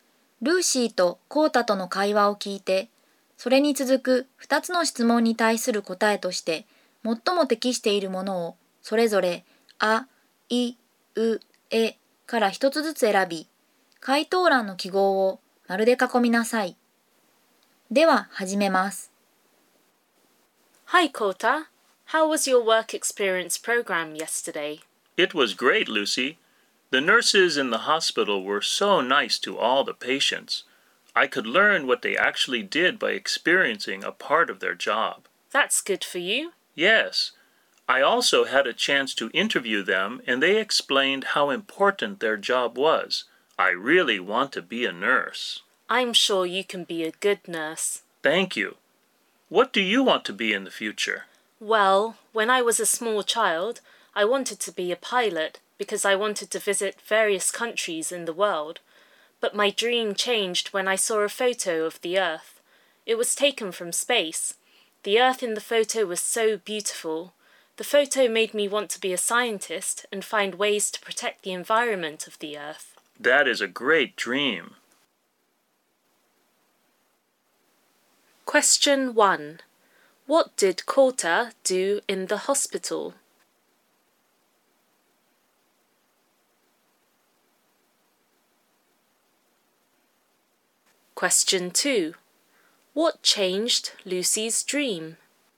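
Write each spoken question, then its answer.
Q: What did Kota do in the hospital?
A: He experienced a part of the nurses' job and interviewed them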